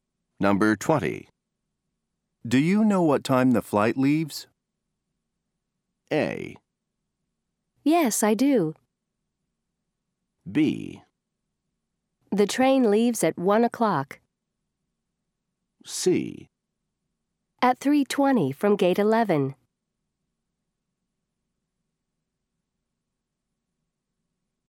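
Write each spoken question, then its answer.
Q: Do you know what time the flight leaves?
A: C: At 3:20 from gate 11.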